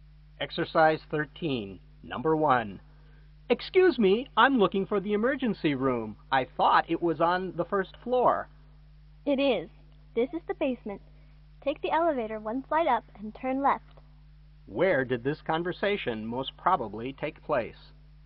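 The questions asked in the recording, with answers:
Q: Where did this conversation most probably take place?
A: In the basement of a hospital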